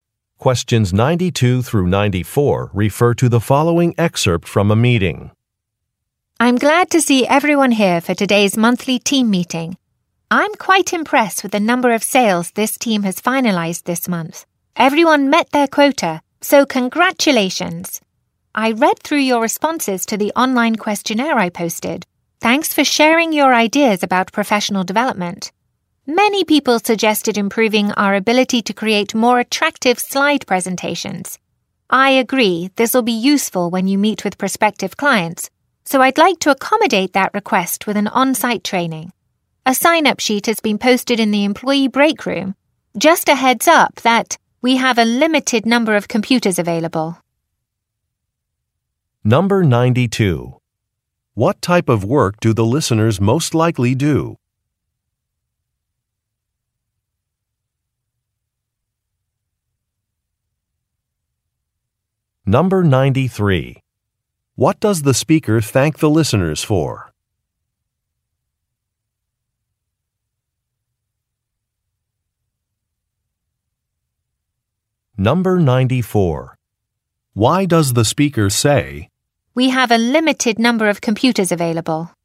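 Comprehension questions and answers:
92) What type of work do the listeners most likely do?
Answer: Sales

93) What does the speaker thank the listeners for?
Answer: Sharing some ideas

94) Why does the speaker say, "we have a limited number of computers available"?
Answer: To encourage the listeners to sign up quickly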